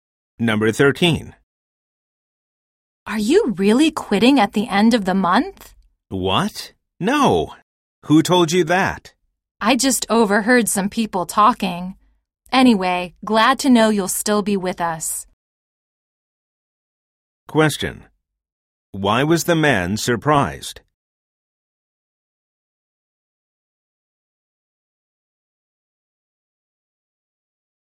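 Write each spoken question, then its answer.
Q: Why was the man surprised?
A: The woman thought he was quitting at the end of the month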